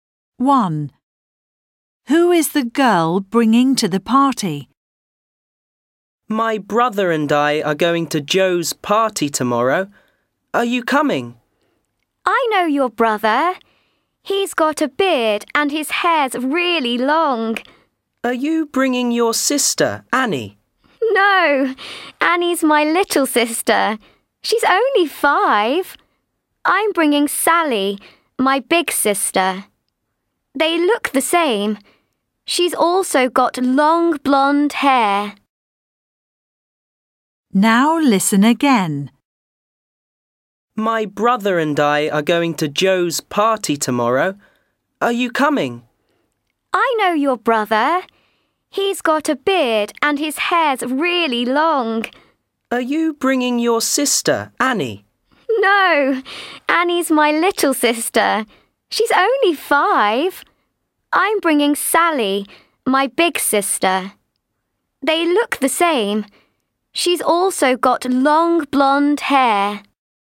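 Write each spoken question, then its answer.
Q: Who is the girl bringing to the party?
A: Sally, her big sister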